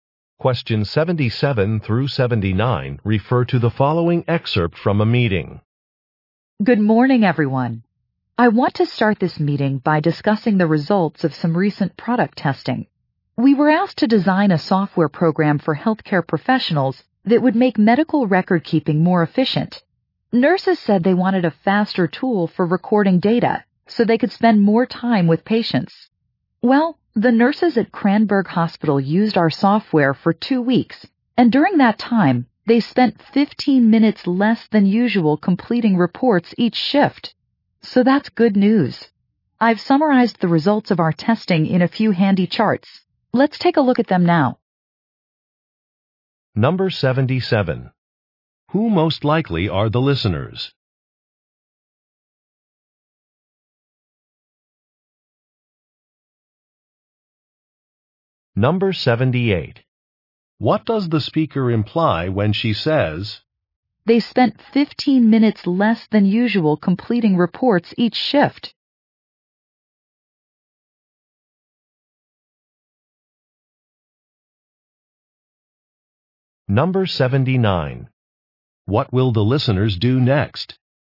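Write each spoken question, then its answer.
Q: Who most likely are the listeners?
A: Software designers

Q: What will the listeners do next?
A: Look at charts of the test results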